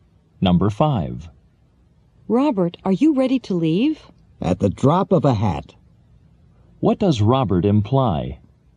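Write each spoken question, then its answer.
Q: What does Robert imply?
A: He is ready to leave right away.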